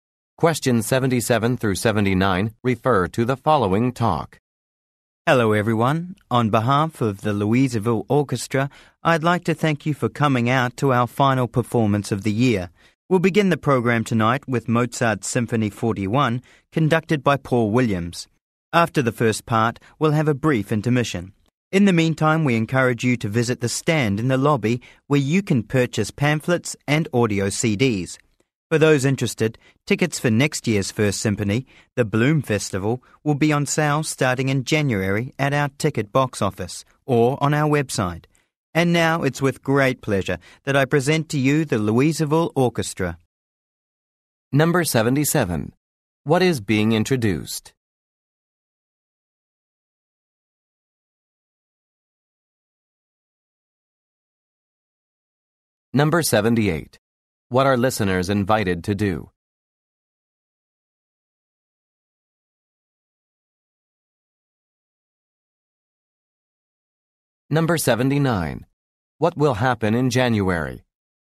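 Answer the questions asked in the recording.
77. The Louisville Orchestra's final performance of the year
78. Visit the lobby stand to buy pamphlets and audio CDs
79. Tickets for next year's Bloom Festival go on sale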